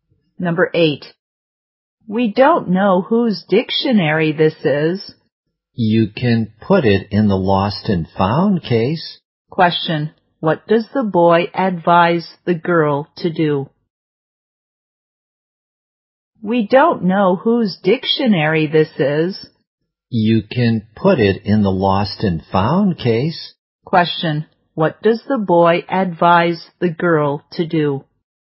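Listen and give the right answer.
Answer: Put the dictionary in the lost and found case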